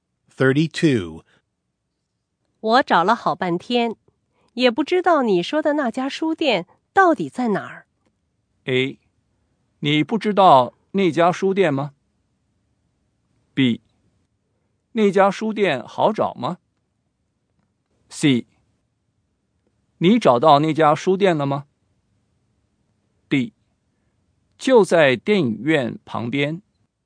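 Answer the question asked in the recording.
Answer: D: 就在电影院旁边。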